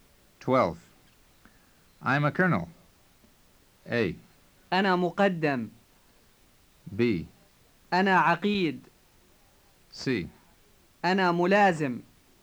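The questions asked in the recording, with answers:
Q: I'm a colonel.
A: B: أنا عقيد.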